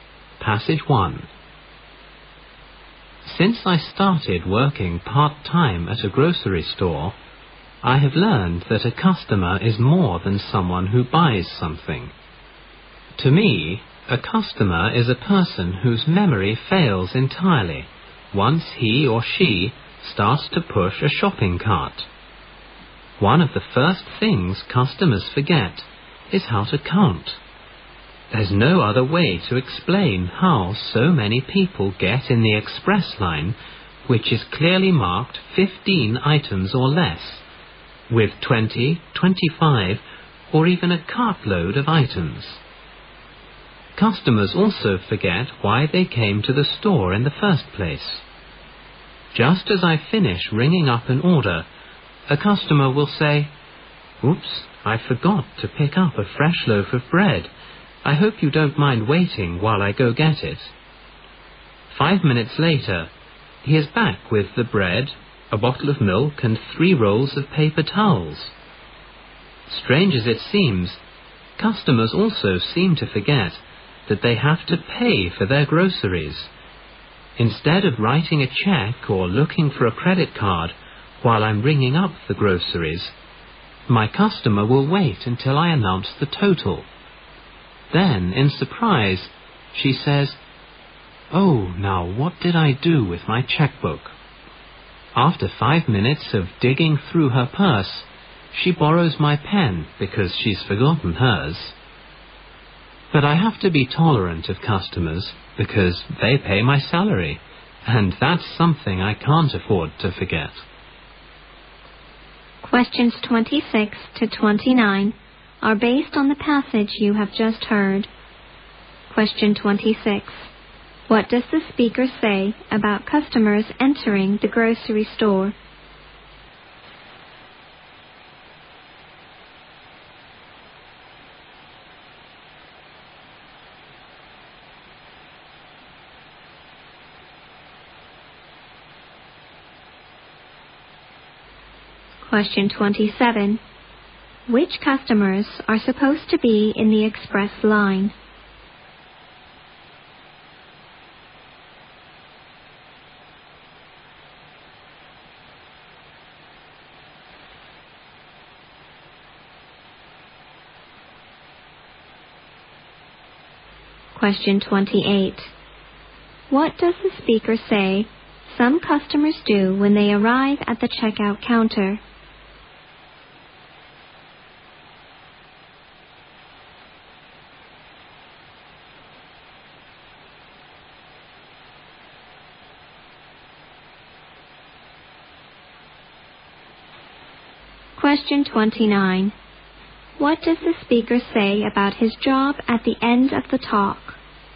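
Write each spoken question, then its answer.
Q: What does the speaker say about customers entering the grocery store?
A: Their memory fails once they start pushing a shopping cart

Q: Which customers are supposed to be in the express line?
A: Those with 15 items or less

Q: What does the speaker say about his job at the end of the talk?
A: He must be tolerant of customers because they pay his salary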